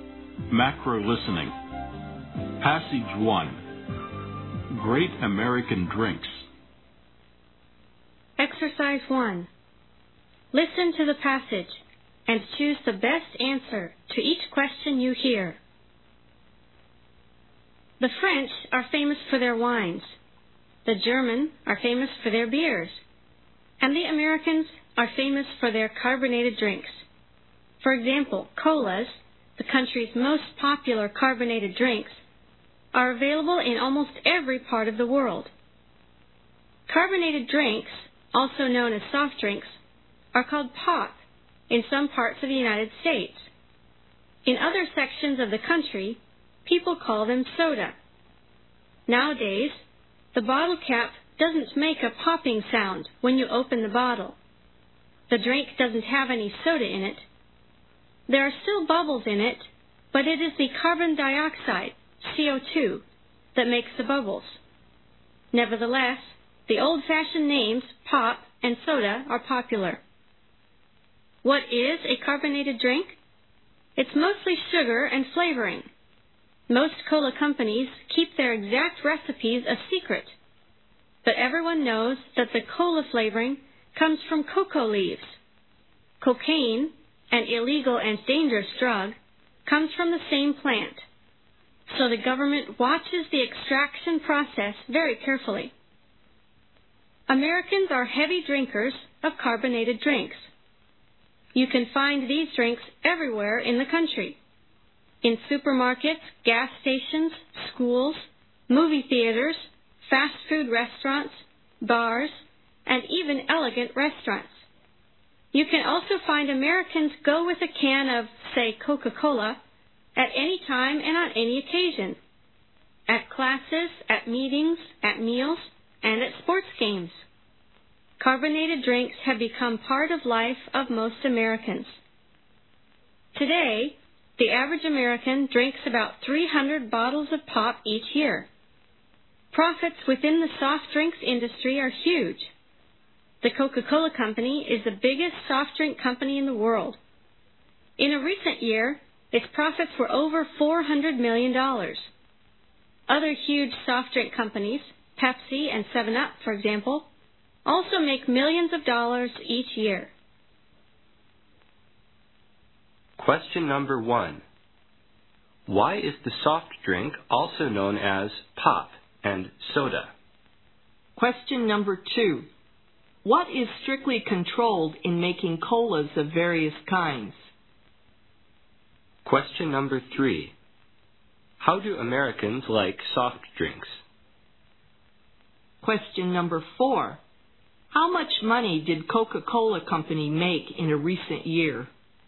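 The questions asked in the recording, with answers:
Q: What is strictly controlled in making colas of various kinds?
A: The extraction of flavoring from cocoa leaves.

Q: How do Americans like soft drinks?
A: Very much; they drink them everywhere, about 300 bottles a year.

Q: How much money did Coca-Cola Company make in a recent year?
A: Over $400 million.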